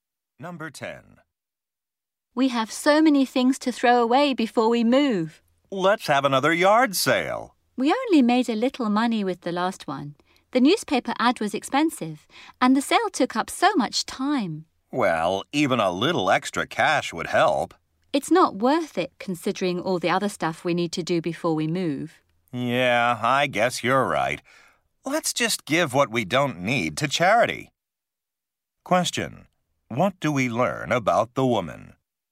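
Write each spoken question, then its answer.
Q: What do we learn about the woman?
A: She thinks a yard sale isn't worth the time and wants to give the items to charity.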